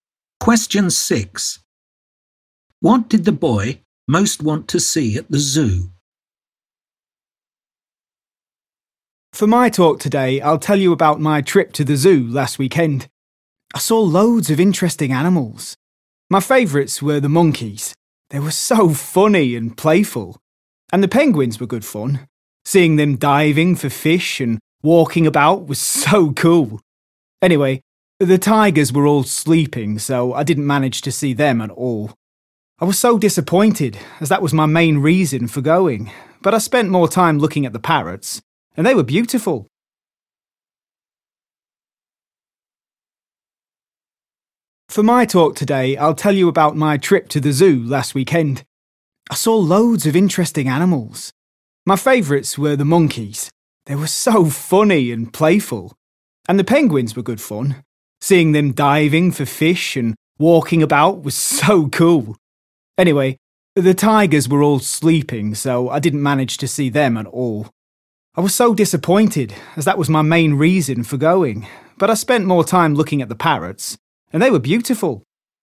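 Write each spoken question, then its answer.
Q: What did the boy most want to see at the zoo?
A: the tigers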